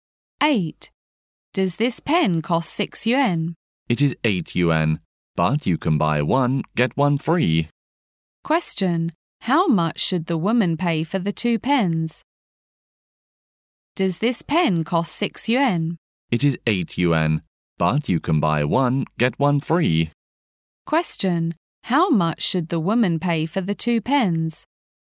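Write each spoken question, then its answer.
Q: How much should the woman pay for the 2 pens?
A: 8 yuan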